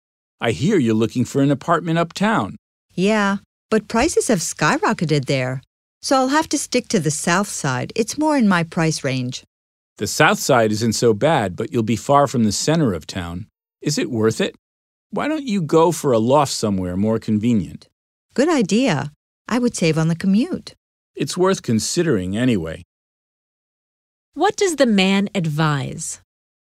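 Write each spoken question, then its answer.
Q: What does the man advise?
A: Looking for a loft somewhere more convenient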